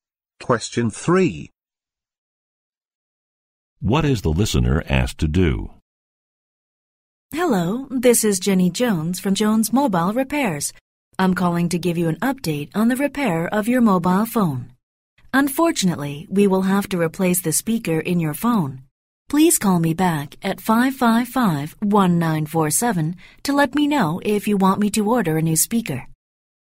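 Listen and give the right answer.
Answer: Call back to say whether to order a new speaker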